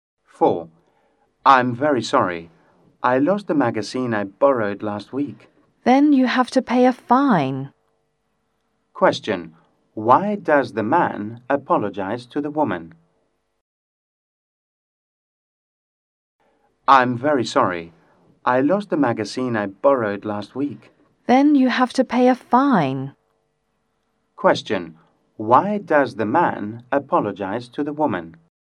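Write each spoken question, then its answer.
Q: Why does the man apologize to the woman?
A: He lost the magazine he borrowed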